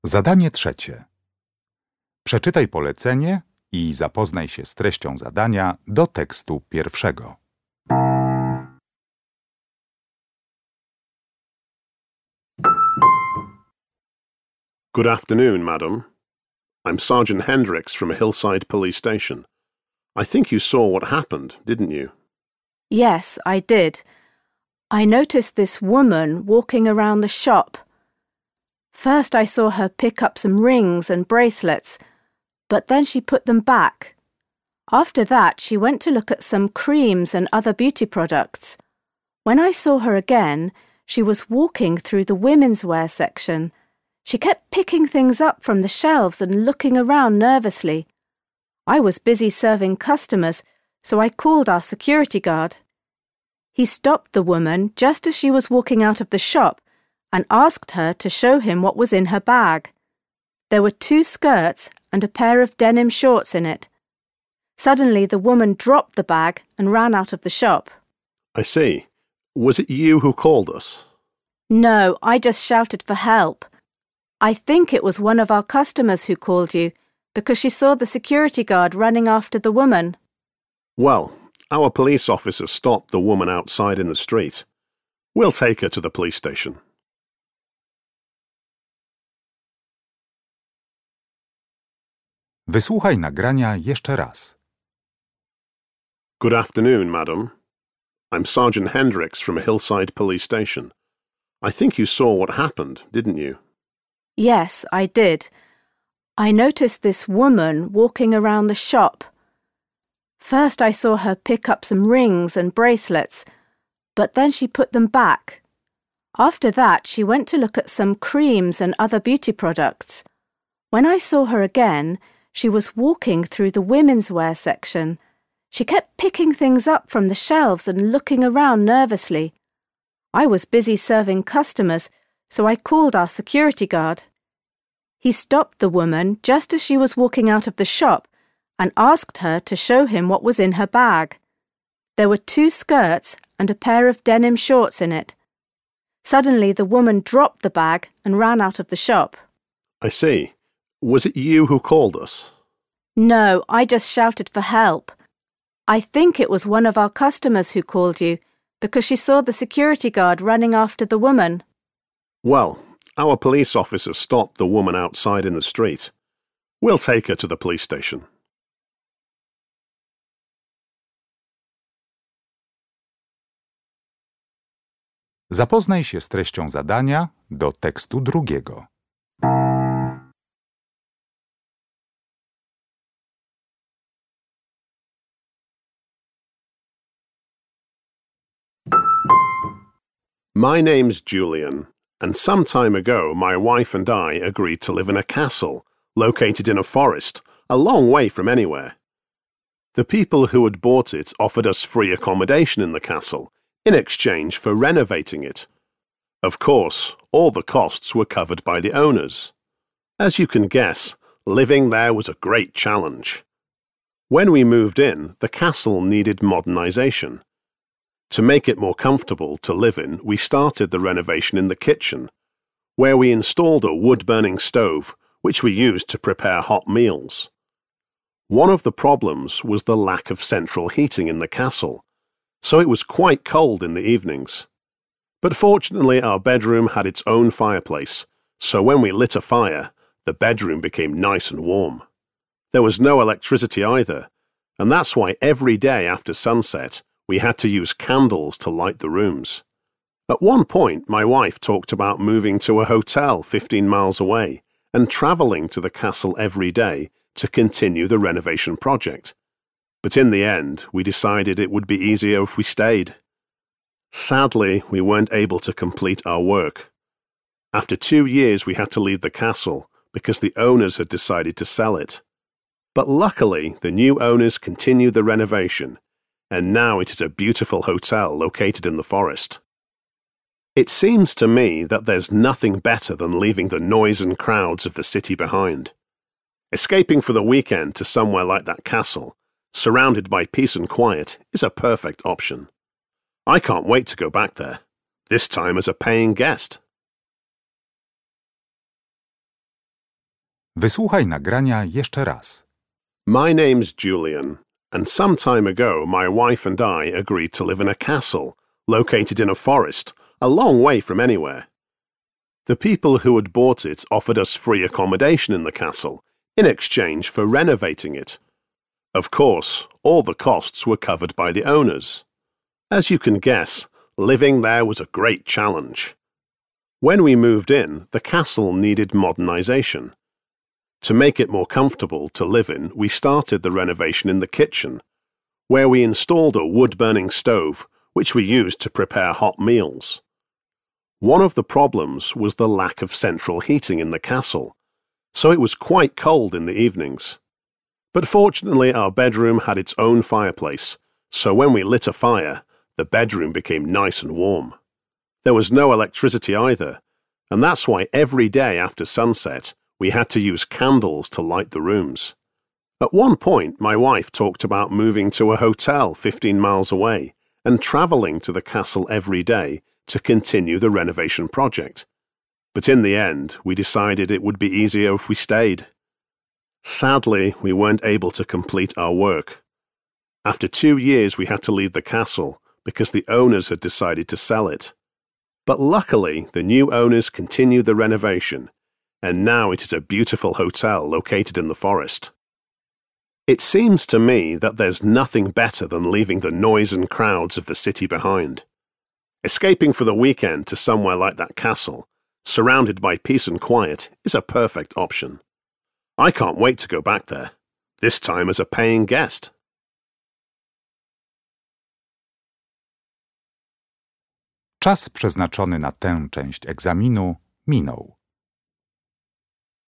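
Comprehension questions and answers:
Uruchamiając odtwarzacz z oryginalnym nagraniem CKE usłyszysz dwukrotnie dwa teksty. Z podanych odpowiedzi wybierz właściwą, zgodną z treścią nagrania.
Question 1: What was found in the woman's bag?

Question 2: The woman who is talking to the policeman is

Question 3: What did Julian and his wife do?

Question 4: During the time spent in the castle, the couple were NOT able to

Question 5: At the end of the recording, Julian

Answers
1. Two skirts and a pair of denim shorts.
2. a shop assistant
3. They renovated a castle in exchange for free accommodation.
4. use electricity
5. says he wants to go back to the castle as a paying guest

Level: poziom podstawowy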